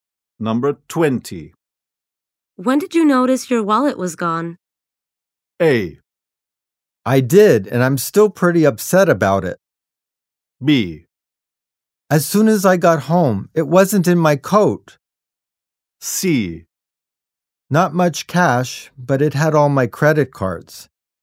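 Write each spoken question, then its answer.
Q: When did you notice your wallet was gone?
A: B: As soon as I got home, it wasn't in my coat.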